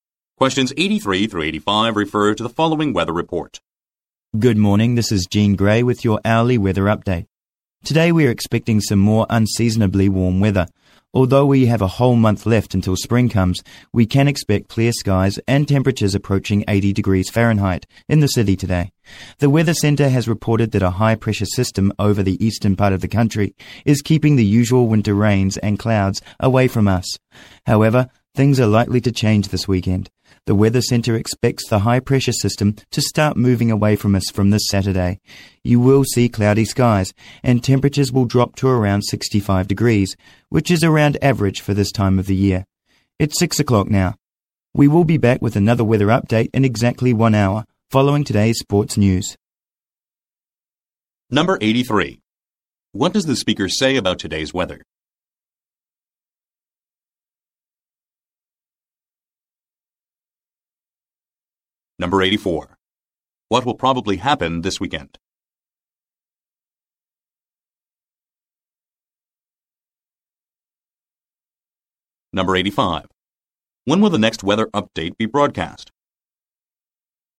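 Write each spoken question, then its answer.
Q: What does the speaker say about today's weather?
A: It will be unusually warm and clear

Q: What will probably happen this weekend?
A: It will get cloudy and temperatures will drop

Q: When will the next weather update be broadcast?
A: At 7 o'clock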